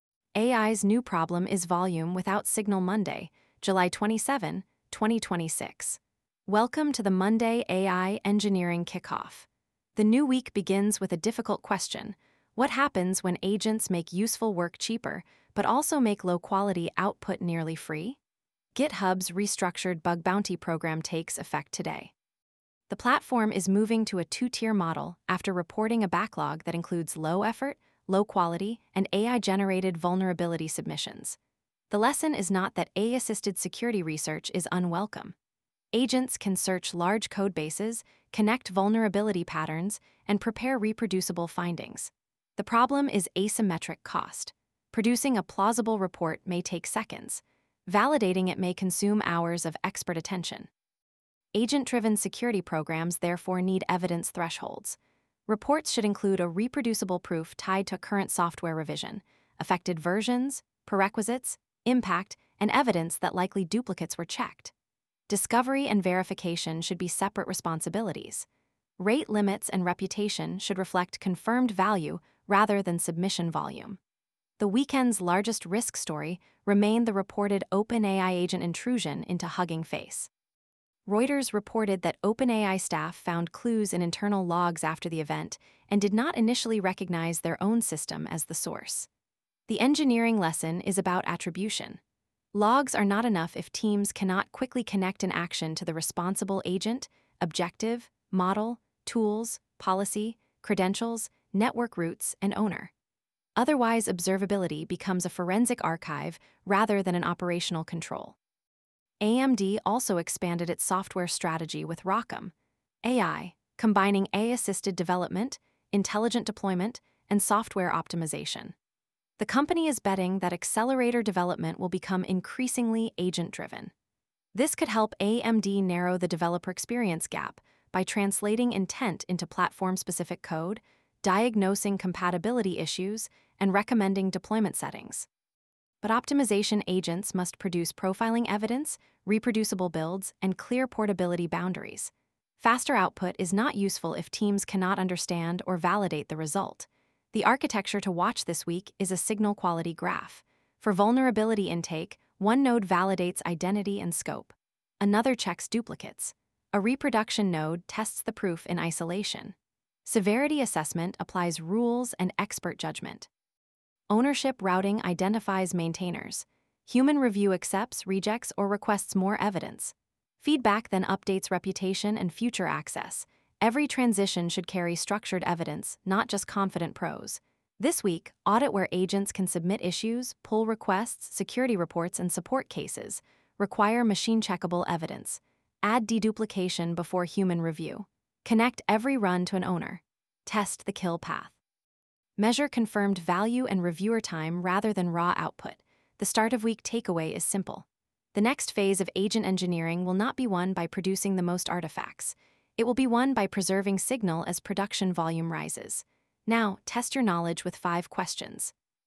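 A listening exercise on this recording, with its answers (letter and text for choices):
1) Why did GitHub restructure its bug-bounty programme?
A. A growing backlog included low-effort, low-quality, and AI-generated reports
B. GitHub stopped accepting all security research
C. Software vulnerabilities no longer exist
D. Every submitted report was confirmed as critical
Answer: A. A growing backlog included low-effort, low-quality, and AI-generated reports

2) What creates the asymmetric cost of low-quality AI security reports?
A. Generating a plausible report is cheap while expert validation remains expensive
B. Agents cannot generate written reports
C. Human review is instantaneous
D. Security programmes have unlimited reviewer capacity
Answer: A. Generating a plausible report is cheap while expert validation remains expensive

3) What was the key observability lesson from the reported Hugging Face incident?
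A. Logs must rapidly connect actions to the responsible agent, objective, policy, and owner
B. Production agents do not need identities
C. Network activity should never be recorded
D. A model name is sufficient for complete attribution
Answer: A. Logs must rapidly connect actions to the responsible agent, objective, policy, and owner

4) What opportunity does ROCm.ai represent for AMD?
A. Using agents to improve development, deployment, and optimisation on AMD accelerators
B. Replacing all AMD hardware with cloud-only software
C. Removing performance profiling from development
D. Preventing developers from using natural-language tools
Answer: A. Using agents to improve development, deployment, and optimisation on AMD accelerators

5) What is the best measure of a high-volume agent workflow?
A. Accepted value, verified outcomes, error rates, and human review cost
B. The total number of generated artefacts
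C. The longest possible agent run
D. The number of unrestricted credentials available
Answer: A. Accepted value, verified outcomes, error rates, and human review cost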